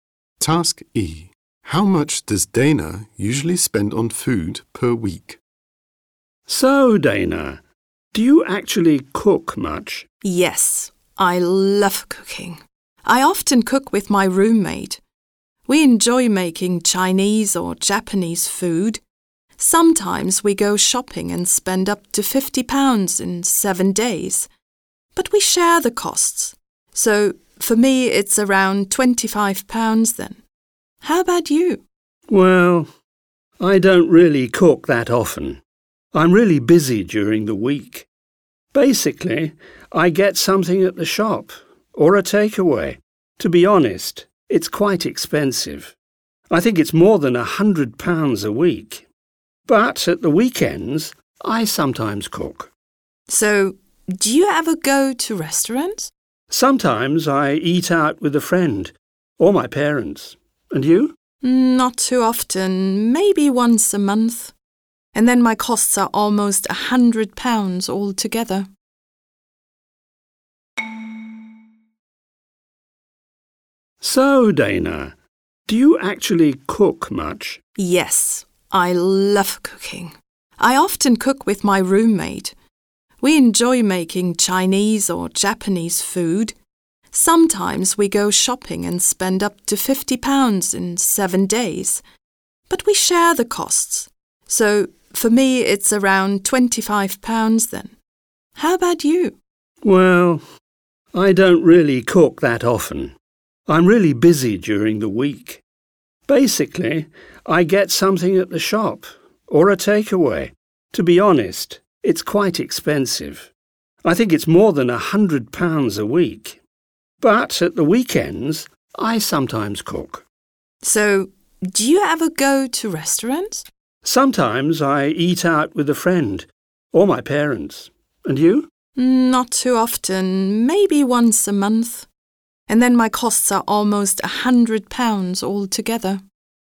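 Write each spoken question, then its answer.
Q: How much does Dana usually spend on food per week?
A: Around £25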